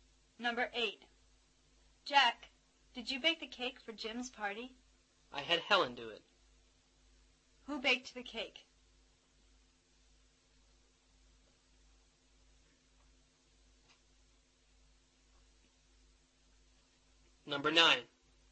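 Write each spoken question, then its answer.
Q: Who baked the cake?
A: Helen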